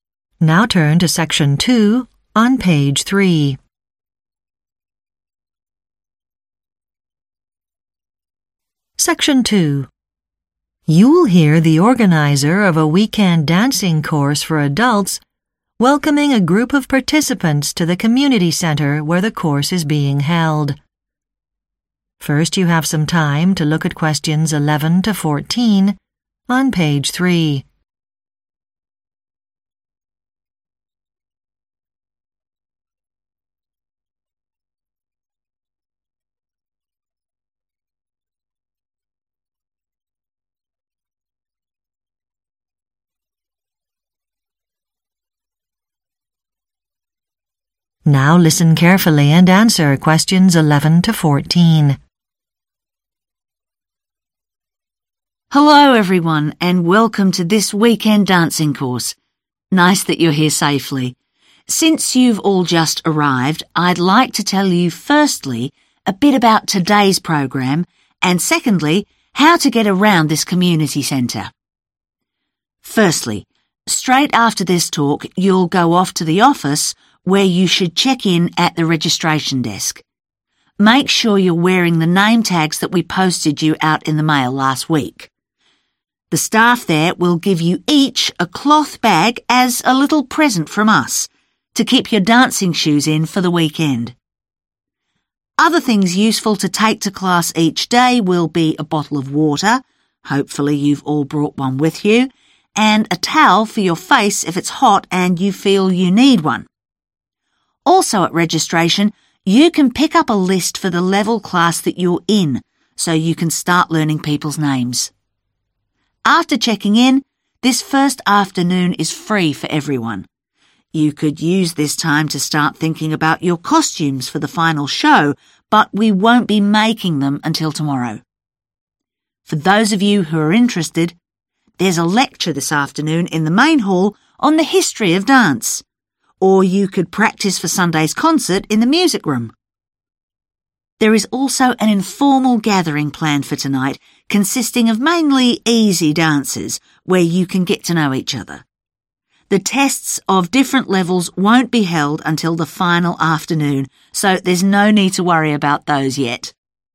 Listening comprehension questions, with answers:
Choose TWO answers. Which TWO items will participants on the dancing course receive when they check in?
Which TWO items will participants on the dancing course receive when they check in?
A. a class list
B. a face towel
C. a name tag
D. a shoe bag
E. a water bottle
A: a shoe bag

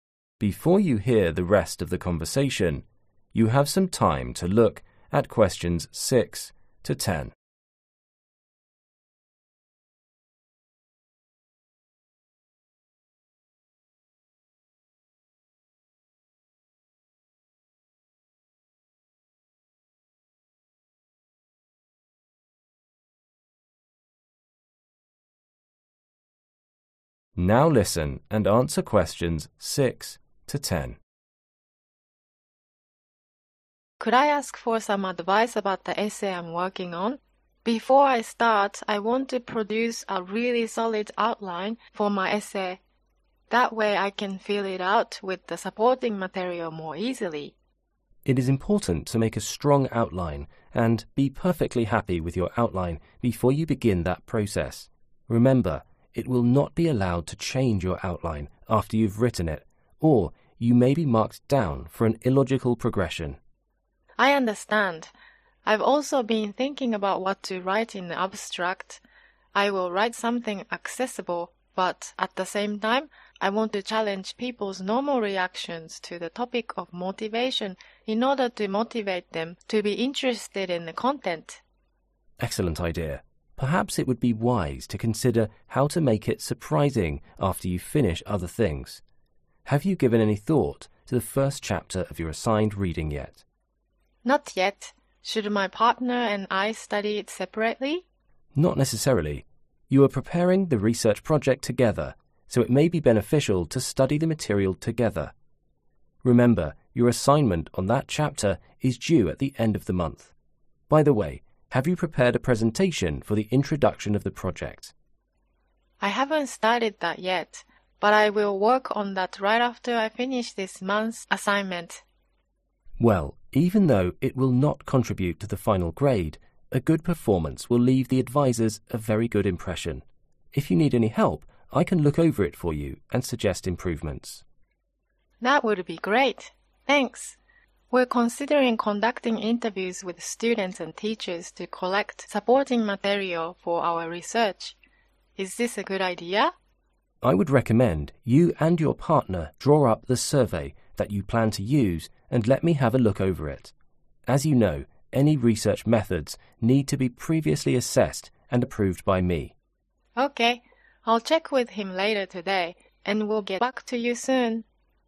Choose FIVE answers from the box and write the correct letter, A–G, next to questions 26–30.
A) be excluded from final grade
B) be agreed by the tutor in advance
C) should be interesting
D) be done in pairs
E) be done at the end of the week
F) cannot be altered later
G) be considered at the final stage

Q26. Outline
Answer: cannot be altered later

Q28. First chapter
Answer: be done in pairs

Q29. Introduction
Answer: be excluded from final grade

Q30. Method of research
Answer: be agreed by the tutor in advance

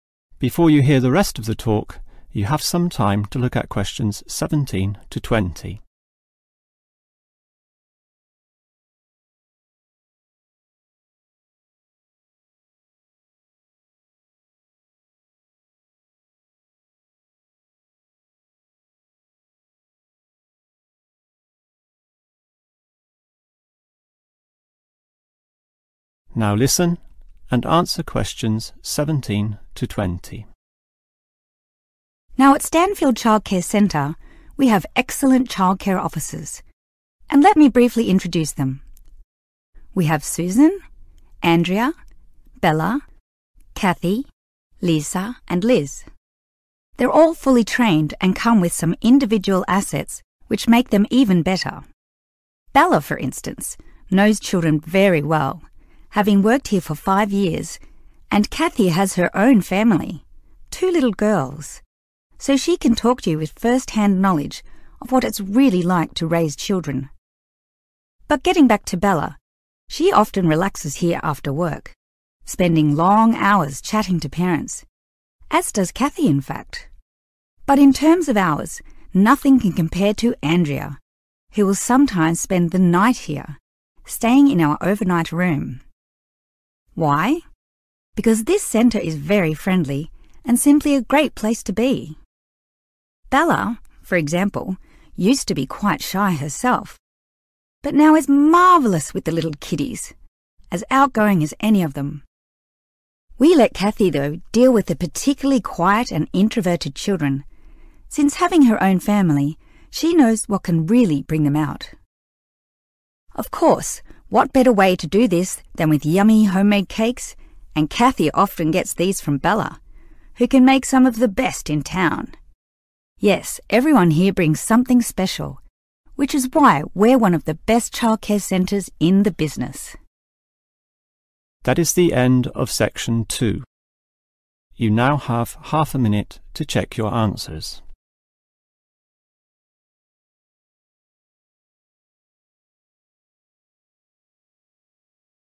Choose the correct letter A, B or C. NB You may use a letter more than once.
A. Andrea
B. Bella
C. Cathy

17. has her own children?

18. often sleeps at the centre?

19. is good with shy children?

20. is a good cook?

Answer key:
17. Cathy
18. Andrea
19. Cathy
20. Bella

